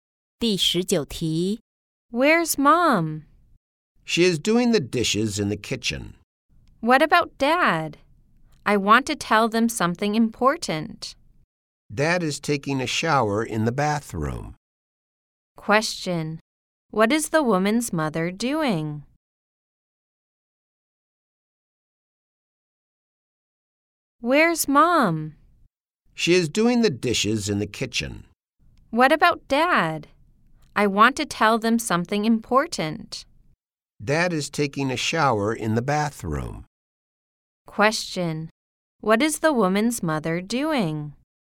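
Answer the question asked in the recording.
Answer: Doing the dishes in the kitchen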